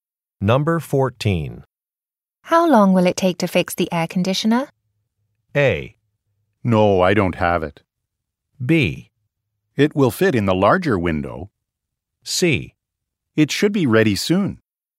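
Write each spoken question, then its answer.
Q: How long will it take to fix the air conditioner?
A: C: It should be ready soon.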